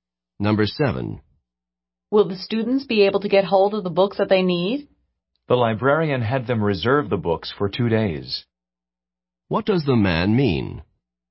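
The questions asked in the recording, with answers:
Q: What does the man mean?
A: Yes, the librarian had them reserve the books for two days.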